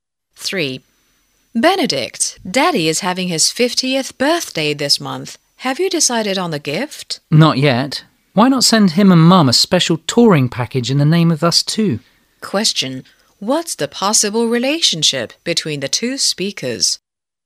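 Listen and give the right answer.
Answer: Brother and sister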